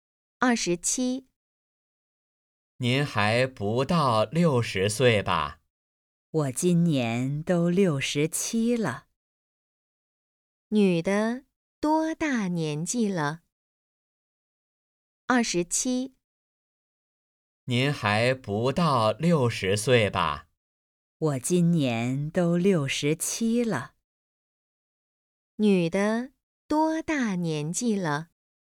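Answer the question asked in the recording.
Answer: 67岁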